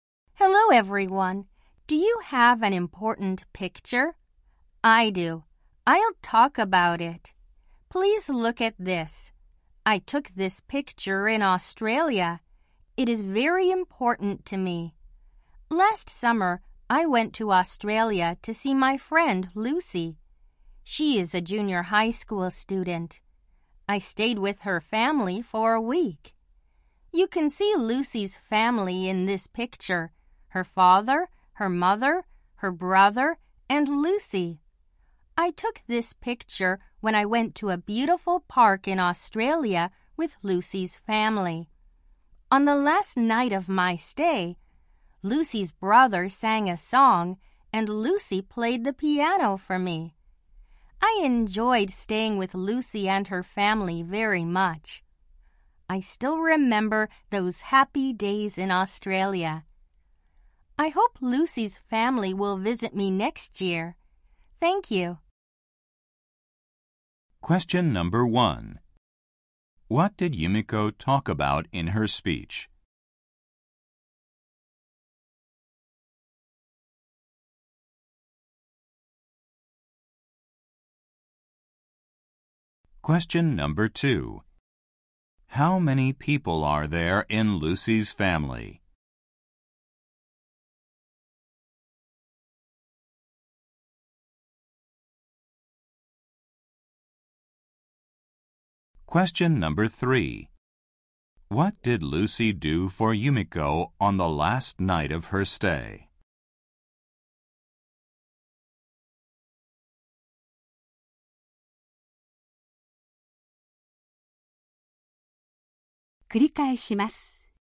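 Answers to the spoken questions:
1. An important picture she took in Australia
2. Four
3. She played the piano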